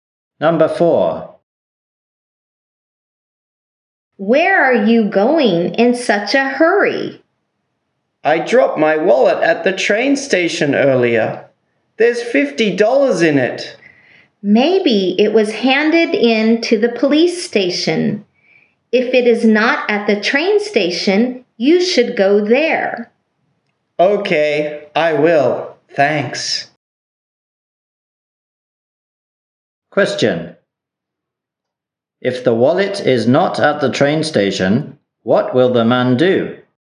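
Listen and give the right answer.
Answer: Go to the police station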